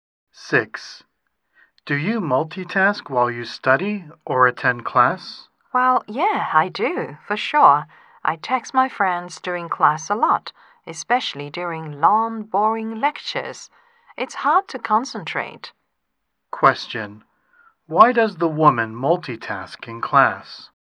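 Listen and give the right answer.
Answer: Long, boring lectures make it hard to concentrate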